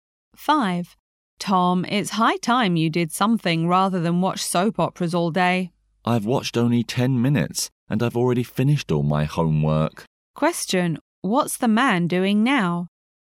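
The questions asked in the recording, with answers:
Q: What's the man doing now?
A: Watching a soap opera on TV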